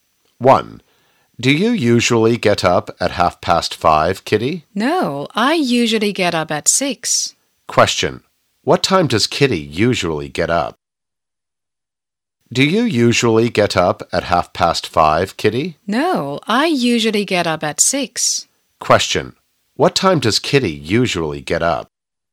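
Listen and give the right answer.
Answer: At 6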